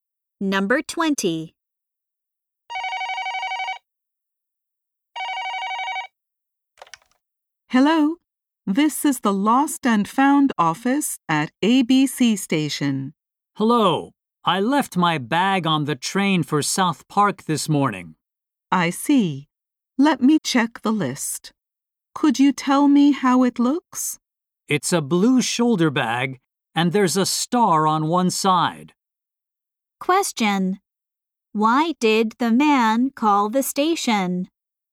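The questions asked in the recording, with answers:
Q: Why did the man call the station?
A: He left his bag on the train.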